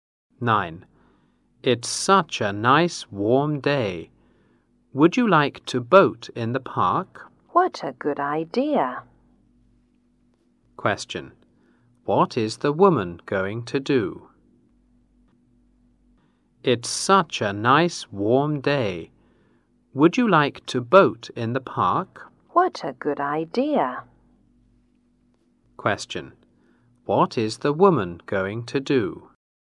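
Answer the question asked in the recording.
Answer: Go boating in the park.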